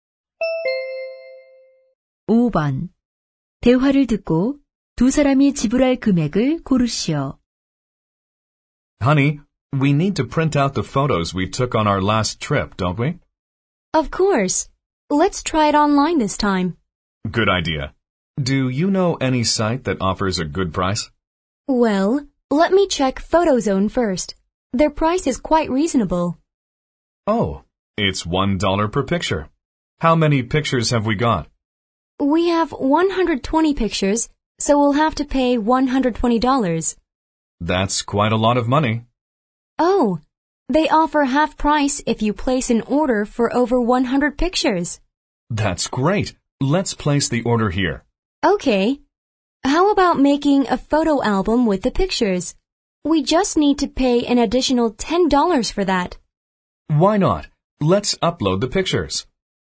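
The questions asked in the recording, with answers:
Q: 대화를 듣고 두 사람이 지불할 금액을 고르시오.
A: $70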